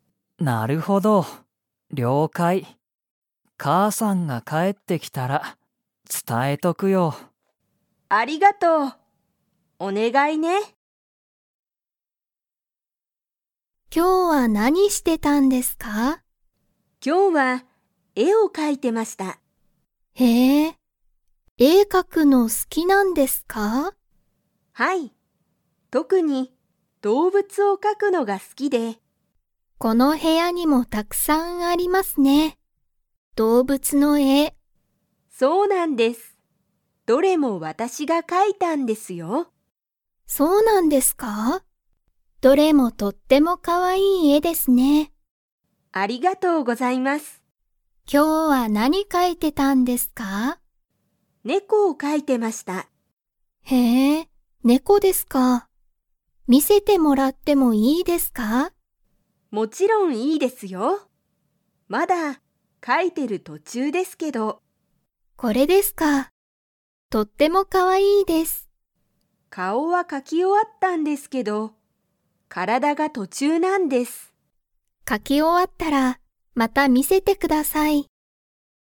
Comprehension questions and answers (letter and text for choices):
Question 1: 松井まついさんは、何なんの絵えを描かくのが好すきですか?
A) 動物どうぶつ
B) 山やま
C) 海うみ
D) 人ひと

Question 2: 松井まついさんは、猫ねこの体からだを 。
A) 描かき終おわった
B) 描かき終おわってない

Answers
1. A) 動物どうぶつ
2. B) 描かき終おわってない

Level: Level 3